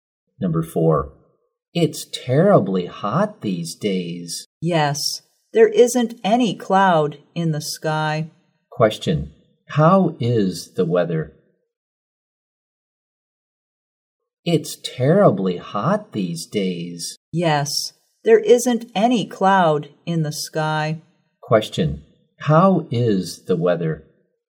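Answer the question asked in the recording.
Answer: Hot and sunny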